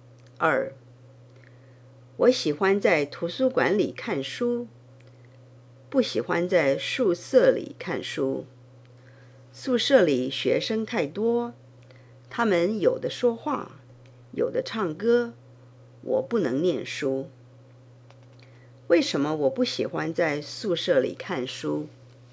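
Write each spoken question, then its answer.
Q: 为什么我不喜欢在宿舍里看书?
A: 宿舍里学生太多,他们有的说话,有的唱歌,我不能念书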